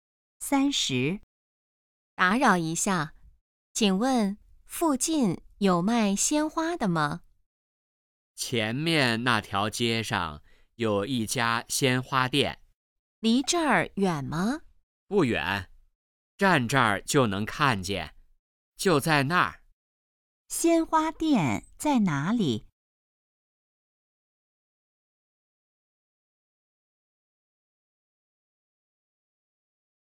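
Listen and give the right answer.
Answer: 前面那条街上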